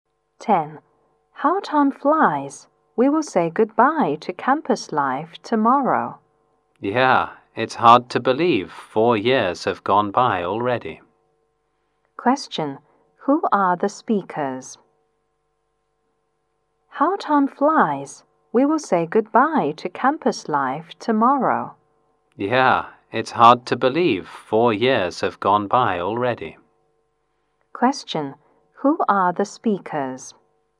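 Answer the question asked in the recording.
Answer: College students about to graduate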